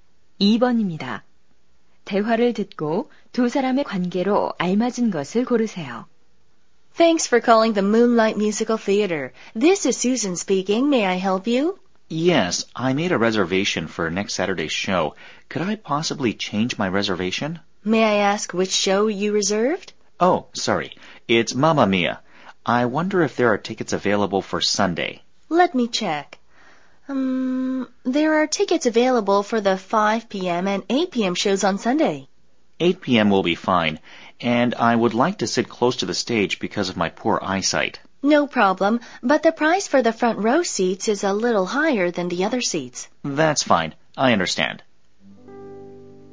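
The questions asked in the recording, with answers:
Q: 대화를 듣고 두 사람의 관계로 알맞은 것을 고르세요.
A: 극장 매표 직원과 관객(고객)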